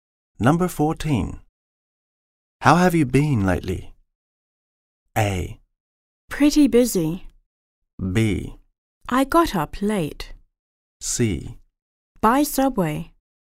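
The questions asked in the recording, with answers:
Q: How have you been lately?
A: A: Pretty busy.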